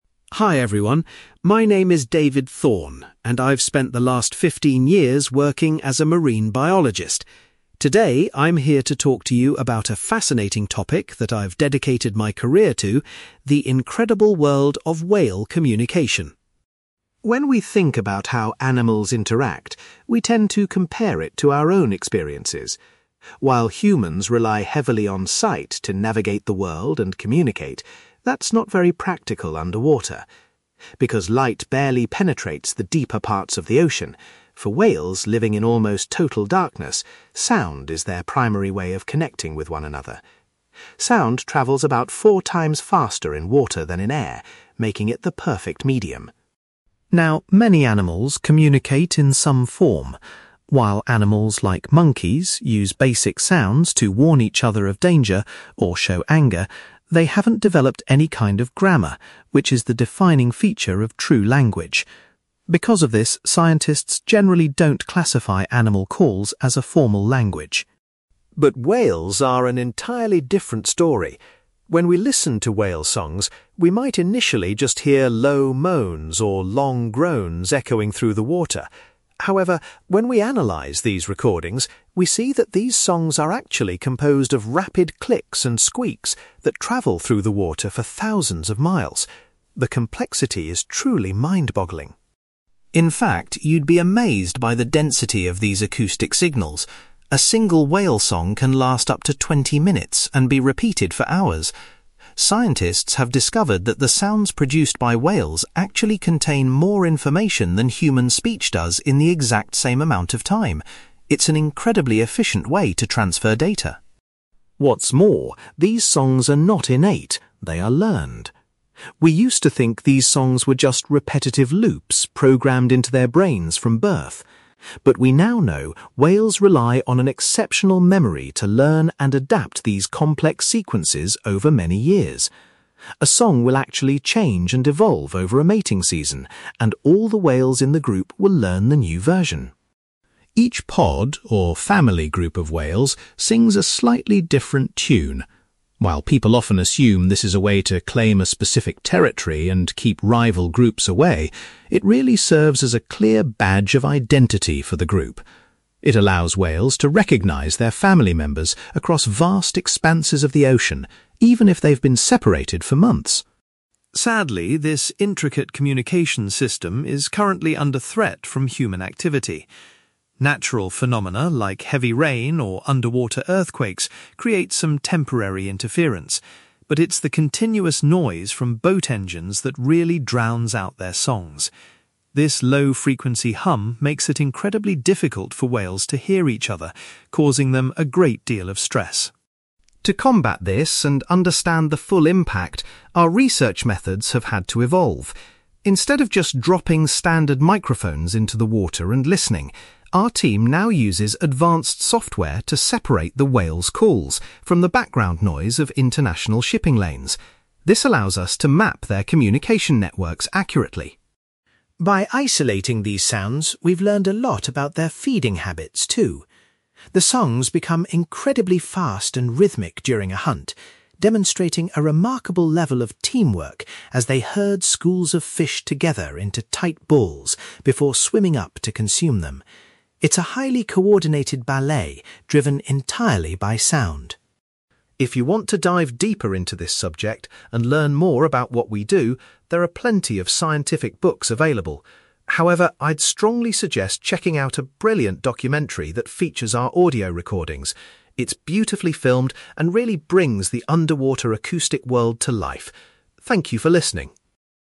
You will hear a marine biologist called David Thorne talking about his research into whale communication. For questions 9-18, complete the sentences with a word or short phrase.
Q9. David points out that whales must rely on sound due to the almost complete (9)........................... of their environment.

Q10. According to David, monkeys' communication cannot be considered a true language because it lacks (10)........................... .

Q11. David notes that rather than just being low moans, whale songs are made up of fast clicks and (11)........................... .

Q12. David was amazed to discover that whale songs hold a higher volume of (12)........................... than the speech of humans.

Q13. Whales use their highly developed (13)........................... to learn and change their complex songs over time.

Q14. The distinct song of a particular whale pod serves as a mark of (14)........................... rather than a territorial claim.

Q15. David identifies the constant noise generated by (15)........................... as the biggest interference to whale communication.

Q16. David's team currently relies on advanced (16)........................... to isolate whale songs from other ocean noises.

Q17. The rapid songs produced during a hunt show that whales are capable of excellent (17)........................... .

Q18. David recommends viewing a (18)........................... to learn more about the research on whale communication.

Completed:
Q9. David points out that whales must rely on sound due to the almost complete darkness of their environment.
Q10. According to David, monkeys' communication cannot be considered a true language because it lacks grammar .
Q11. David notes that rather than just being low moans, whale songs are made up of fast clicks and squeaks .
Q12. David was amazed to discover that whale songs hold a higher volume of information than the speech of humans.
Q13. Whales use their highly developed memory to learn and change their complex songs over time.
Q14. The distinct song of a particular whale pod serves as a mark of identity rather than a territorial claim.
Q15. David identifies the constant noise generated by boat engines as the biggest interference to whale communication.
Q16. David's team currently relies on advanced software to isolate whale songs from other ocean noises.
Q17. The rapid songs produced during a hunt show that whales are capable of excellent teamwork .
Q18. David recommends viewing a documentary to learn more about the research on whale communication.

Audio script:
David Thorne: Hi everyone. My name is David Thorne, and I've spent the last fifteen years working as a marine biologist. Today, I'm here to talk to you about a fascinating topic that I've dedicated my career to: the incredible world of whale communication.
When we think about how animals interact, we tend to compare it to our own experiences. While humans rely heavily on sight to navigate the world and communicate, that's not very practical underwater. Because light barely penetrates the deeper parts of the ocean, for whales living in almost total darkness, sound is their primary way of connecting with one another. Sound travels about four times faster in water than in air, making it the perfect medium.
Now, many animals communicate in some form. While animals like monkeys use basic sounds to warn each other of danger or show anger, they haven't developed any kind of grammar, which is the defining feature of true language. Because of this, scientists generally don't classify animal calls as a formal language.
But whales are an entirely different story. When we listen to whale songs, we might initially just hear low moans or long groans echoing through the water. However, when we analyze these recordings, we see that these songs are actually composed of rapid clicks and squeaks that travel through the water for thousands of miles. The complexity is truly mind-boggling.
In fact, you'd be amazed by the density of these acoustic signals. A single whale song can last up to twenty minutes and be repeated for hours. Scientists have discovered that the sounds produced by whales actually contain more information than human speech does in the exact same amount of time. It's an incredibly efficient way to transfer data.
What's more, these songs are not innate; they are learned. We used to think these songs were just repetitive loops programmed into their brains from birth. But we now know whales rely on an exceptional memory to learn and adapt these complex sequences over many years. A song will actually change and evolve over a mating season, and all the whales in the group will learn the new version.
Each pod, or family group of whales, sings a slightly different tune. While people often assume this is a way to claim a specific territory and keep rival groups away, it really serves as a clear badge of identity for the group. It allows whales to recognize their family members across vast expanses of the ocean, even if they've been separated for months.
Sadly, this intricate communication system is currently under threat from human activity. Natural phenomena like heavy rain or underwater earthquakes create some temporary interference, but it's the continuous noise from boat engines that really drowns out their songs. This low-frequency hum makes it incredibly difficult for whales to hear each other, causing them a great deal of stress.
To combat this and understand the full impact, our research methods have had to evolve. Instead of just dropping standard microphones into the water and listening, our team now uses advanced software to separate the whales' calls from the background noise of international shipping lanes. This allows us to map their communication networks accurately.
By isolating these sounds, we've learned a lot about their feeding habits, too. The songs become incredibly fast and rhythmic during a hunt, demonstrating a remarkable level of teamwork as they herd schools of fish together into tight balls before swimming up to consume them. It's a highly coordinated ballet driven entirely by sound.
If you want to dive deeper into this subject and learn more about what we do, there are plenty of scientific books available. However, I'd strongly suggest checking out a brilliant documentary that features our audio recordings. It's beautifully filmed and really brings the underwater acoustic world to life. Thank you for listening!

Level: B2